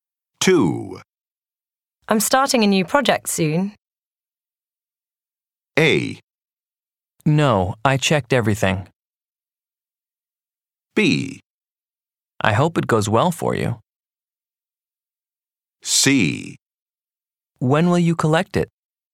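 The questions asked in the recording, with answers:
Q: I'm starting a new project soon.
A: B: I hope it goes well for you.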